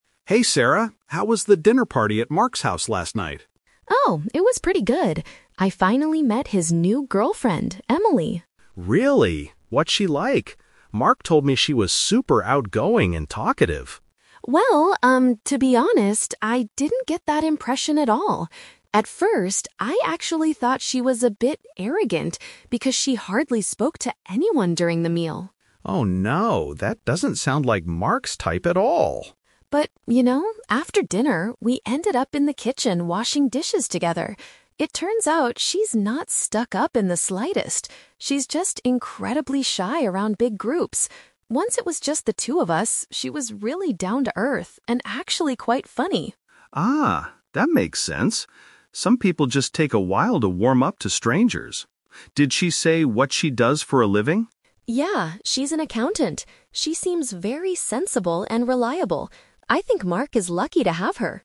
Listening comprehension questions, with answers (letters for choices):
Listen to a conversation between two friends, Leo and Sarah. For each question, choose the correct answer A, B, or (C).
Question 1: What was Sarah's INITIAL impression of Emily?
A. She was very friendly.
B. She seemed too proud.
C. She was extremely nervous.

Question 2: Why was Emily quiet during the dinner?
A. She feels uncomfortable in large crowds.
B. She was tired from her accounting job.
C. She did not like Mark's friends.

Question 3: How does Sarah describe Emily's personality after getting to know her?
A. Outgoing and talkative.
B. Serious and boring.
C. Practical and humorous.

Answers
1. B
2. A
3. C

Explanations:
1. In the audio, Sarah says, "At first, I actually thought she was a bit arrogant." The word "arrogant" means feeling too proud or acting better than others.
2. Sarah explains that Emily is "incredibly shy around big groups." Option A is a perfect paraphrase of this phrase.
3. After washing dishes together, Sarah realizes Emily is "down-to-earth" (which means practical and sensible) and "quite funny" (which means humorous).

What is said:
Leo: Hey, Sarah. How was the dinner party at Mark's house last night?
Sarah: Oh, it was pretty good. I finally met his new girlfriend, Emily.
Leo: Really? What's she like? Mark told me she was super outgoing and talkative.
Sarah: Well, um, to be honest, I didn't get that impression at all. At first, I actually thought she was a bit arrogant because she hardly spoke to anyone during the meal.
Leo: Oh no. That doesn't sound like Mark's type at all.
Sarah: But, you know, after dinner, we ended up in the kitchen washing dishes together. It turns out she's not stuck-up in the slightest. She's just incredibly shy around big groups. Once it was just the two of us, she was really down-to-earth and actually quite funny.
Leo: Ah, that makes sense. Some people just take a while to warm up to strangers. Did she say what she does for a living?
Sarah: Yeah, she's an accountant.